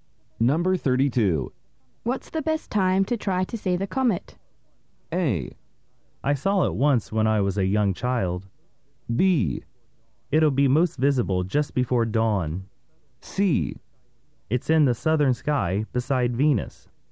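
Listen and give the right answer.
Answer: B: It'll be most visible just before dawn.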